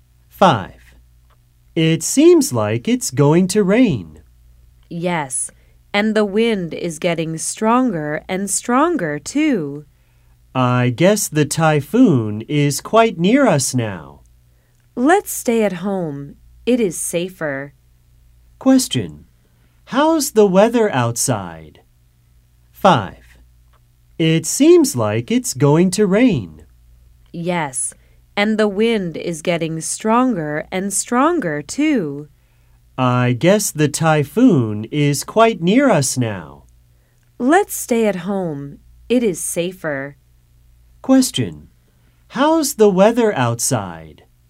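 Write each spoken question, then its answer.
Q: Question, how's the weather outside?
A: Windy, and it's going to rain (a typhoon is coming)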